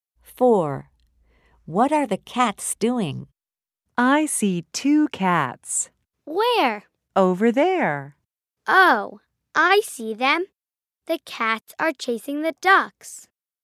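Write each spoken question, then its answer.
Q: What are the cats doing?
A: Chasing the ducks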